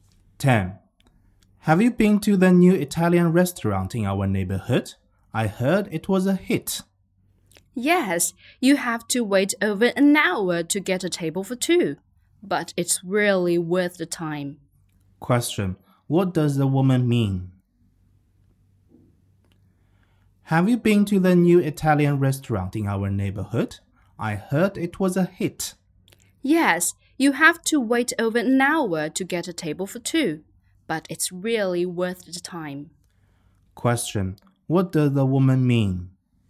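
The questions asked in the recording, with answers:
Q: What does the woman mean?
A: The restaurant is popular and worth the wait.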